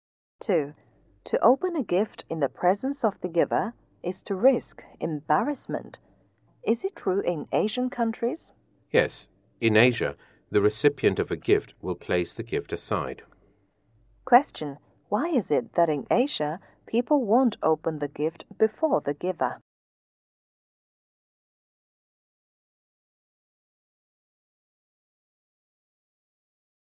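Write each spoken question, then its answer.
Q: Why is it that in Asia, people won't open the gift before the giver?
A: To avoid risking embarrassment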